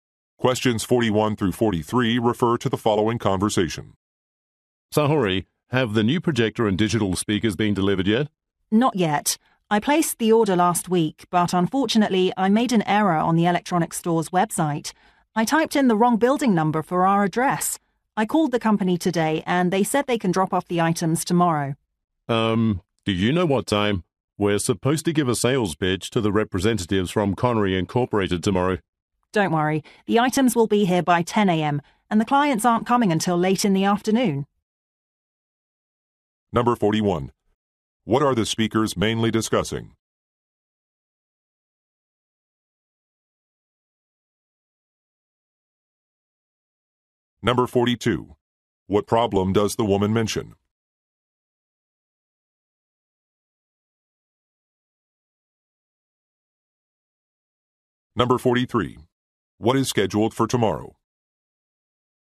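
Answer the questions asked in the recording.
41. A delivery of a projector and speakers
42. She typed the wrong building number in the address
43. A sales pitch to clients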